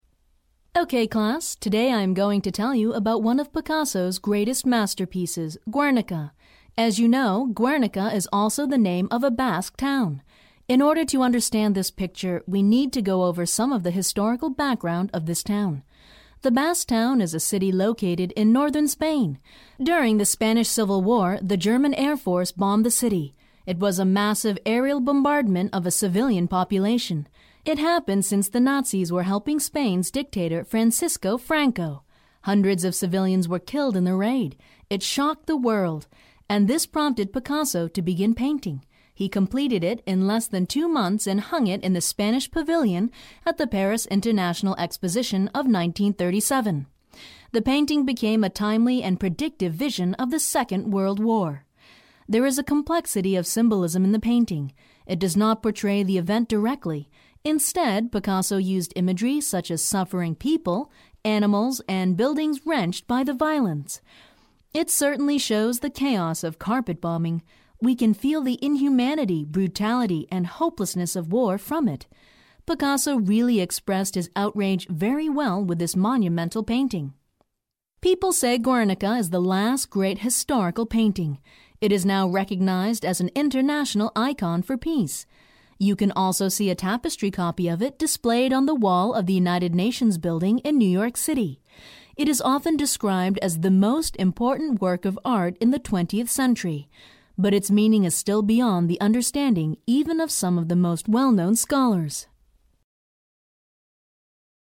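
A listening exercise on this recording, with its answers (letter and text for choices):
Listen to the recording and answer the multiple-choice question by selecting the correct response. Only one response is correct.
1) According to the lecture, why do the most well-known scholars still find the meaning of the painting beyond their understanding?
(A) The painting has a complexity of symbolism.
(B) The shocking events leading to the painting are still mysterious.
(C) It is the last great historical painting.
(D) The painting portrayed the event directly with imagery.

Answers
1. (A) The painting has a complexity of symbolism.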